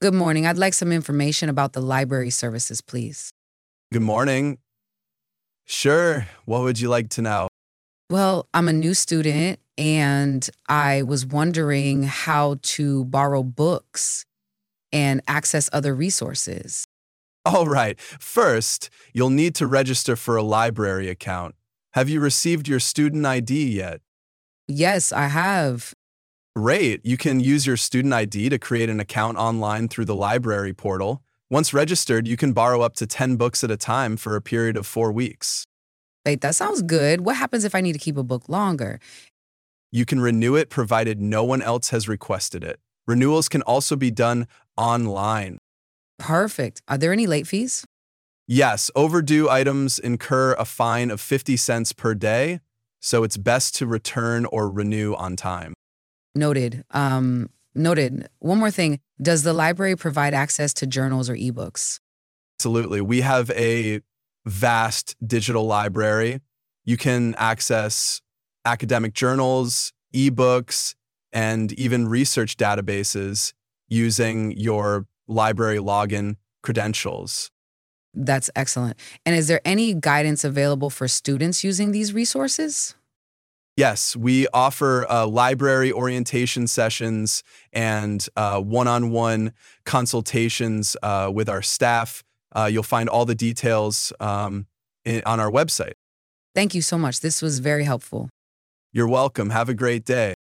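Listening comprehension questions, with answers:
Listen to the audio and fill in the blanks on your notebook. You may listen to the audios more than once.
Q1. Good morning, I'd like some information about the (1) _______________, please.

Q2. Well, I'm a (2) _______________, and I was wondering how to (3) _______________ books and access other (4) _______________.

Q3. Well, I'm a (2) _______________, and I was wondering how to (3) _______________ books and access other (4) _______________.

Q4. Well, I'm a (2) _______________, and I was wondering how to (3) _______________ books and access other (4) _______________.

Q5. First, you'll need to (5) _______________ for a library account.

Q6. Have you received your (6) _______________ yet?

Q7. You can use your student ID to create an account online through the (7) ____________.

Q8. Once registered, you can borrow up to (8) ___________ at a time for a period of four weeks.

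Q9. What happens if I need to keep a book (9) _______________?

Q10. You can (10) _______ it, provided no one else has requested it.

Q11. (11) _________ can also be done online.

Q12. Are there any (12) _______________?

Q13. Yes, (13) ________ items (14) _______________ a fine of 50 cents per day, so it's best to return or renew on time.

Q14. Yes, (13) ________ items (14) _______________ a fine of 50 cents per day, so it's best to return or renew on time.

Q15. does the library provide access to (15) ________ or e-books?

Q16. We have a vast (16) _________.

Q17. You can access academic journals, e-books, and even (17) _______ using your library login (18) _________.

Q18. You can access academic journals, e-books, and even (17) _______ using your library login (18) _________.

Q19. And is there any (19) _________ available for students using these resources?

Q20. Yes, we offer library (20) _______________ and one-on-one consultations with our staff.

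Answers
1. library services
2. new student
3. borrow
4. resources
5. register
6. student ID
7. library portal
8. 10 books
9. longer
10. renew
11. Renewals
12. late fees
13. overdue
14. incur
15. journals
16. digital library
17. research databases
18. credentials
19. guidance
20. orientation sessions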